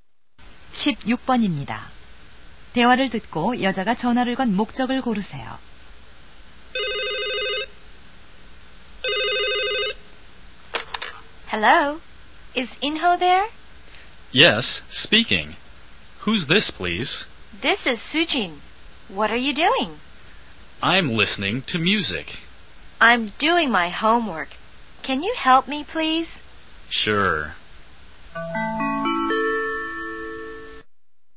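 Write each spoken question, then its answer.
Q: 대화를 듣고 여자가 전화를 건 목적을 고르세요.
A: 숙제 도움을 부탁하려고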